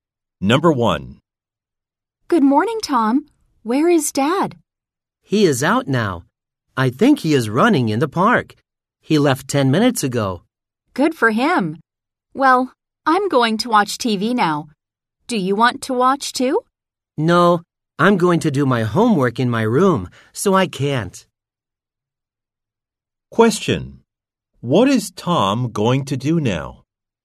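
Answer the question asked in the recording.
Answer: Do his homework in his room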